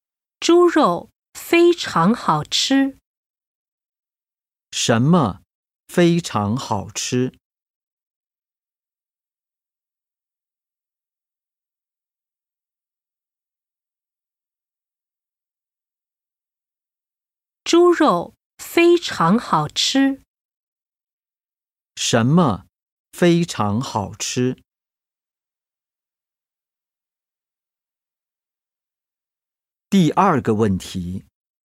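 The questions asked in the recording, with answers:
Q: 什么非常好吃?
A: 猪肉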